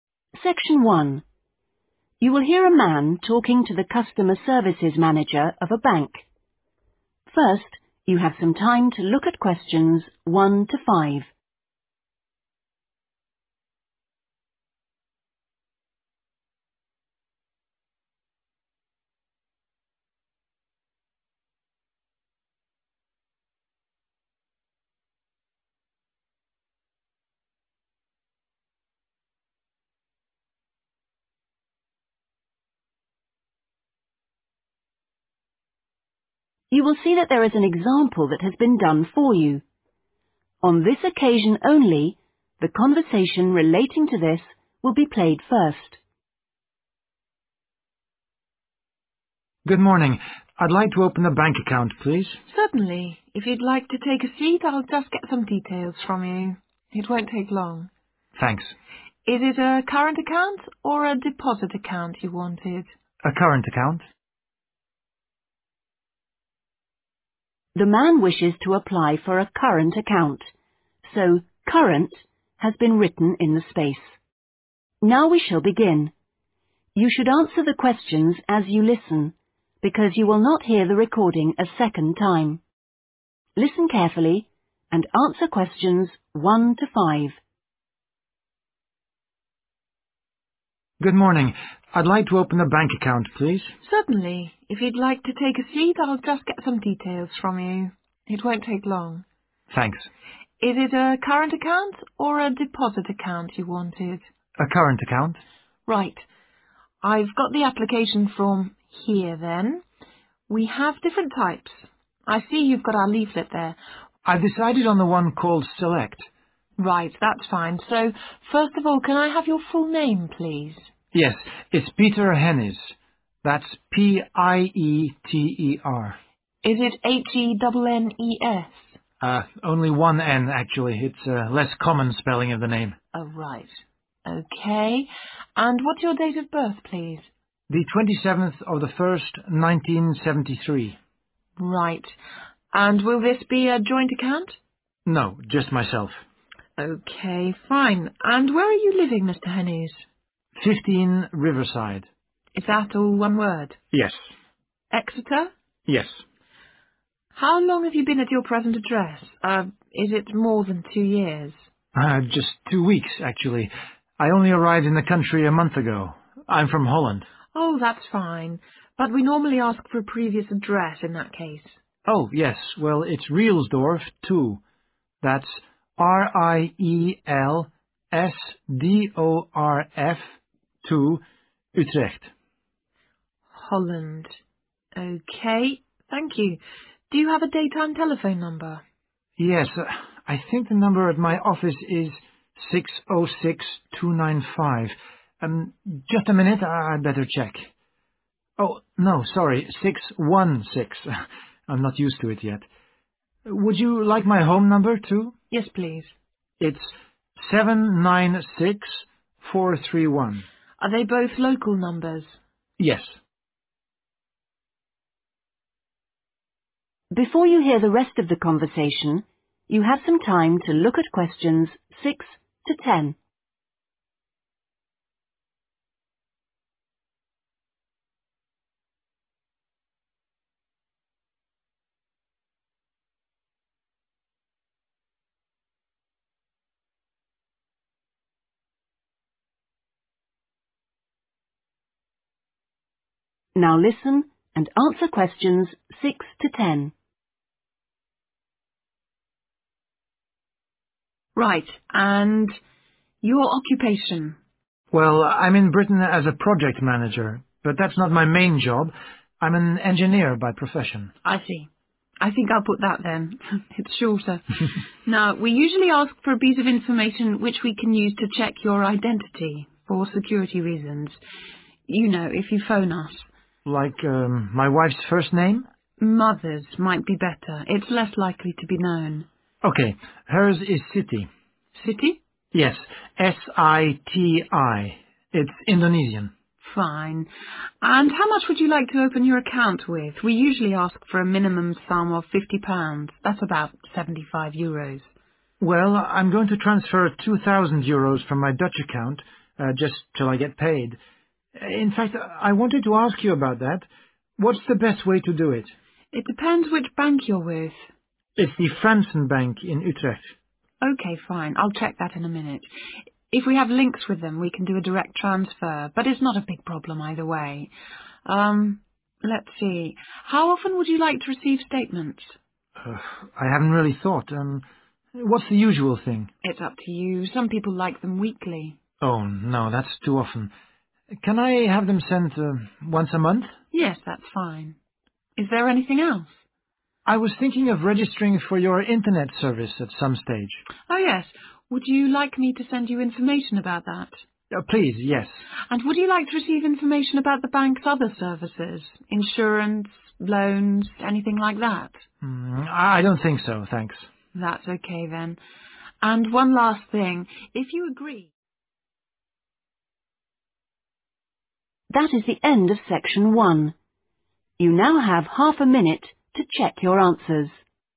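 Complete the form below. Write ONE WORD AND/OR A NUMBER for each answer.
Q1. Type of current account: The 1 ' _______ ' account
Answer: Select

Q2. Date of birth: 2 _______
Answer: 27/01/1973

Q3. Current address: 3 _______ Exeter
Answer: 15 Riverside

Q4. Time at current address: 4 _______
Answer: 2 weeks

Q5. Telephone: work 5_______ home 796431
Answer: 616295

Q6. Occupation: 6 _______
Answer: engineer

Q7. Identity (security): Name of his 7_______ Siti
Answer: mother

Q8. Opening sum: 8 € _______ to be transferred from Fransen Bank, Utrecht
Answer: 2000

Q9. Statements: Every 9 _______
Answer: month

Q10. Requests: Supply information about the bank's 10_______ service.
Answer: internet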